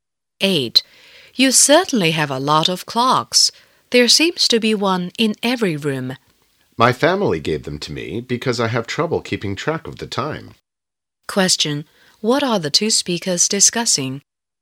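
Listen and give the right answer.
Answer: The clocks in the house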